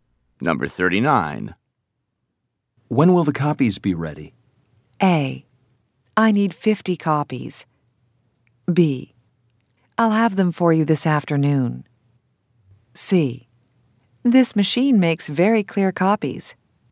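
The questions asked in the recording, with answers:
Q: When will the copies be ready?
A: B: I'll have them for you this afternoon.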